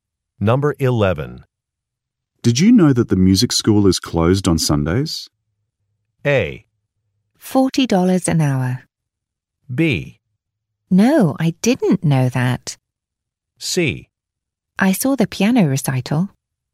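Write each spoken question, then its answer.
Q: Did you know that the music school is closed on Sundays?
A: B: No, I didn't know that.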